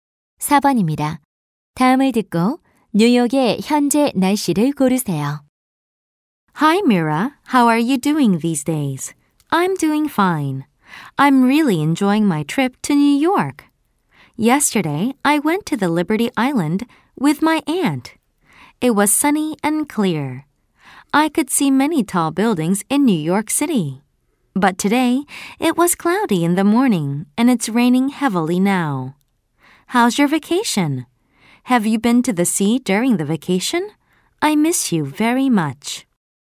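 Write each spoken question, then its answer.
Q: 다음을 듣고 뉴욕의 현재 날씨를 고르세요.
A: 비가 많이 옴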